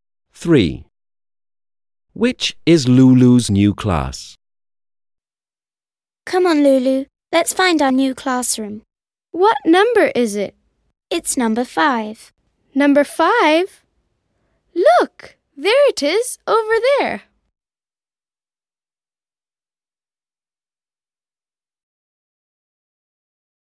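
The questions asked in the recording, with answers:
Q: Which is Lulu's new class?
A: Number 5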